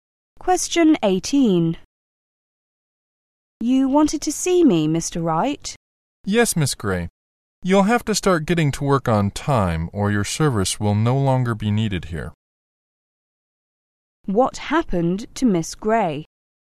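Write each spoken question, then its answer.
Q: What happened to Miss Gray?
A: She was warned that she could lose her job if she keeps arriving late.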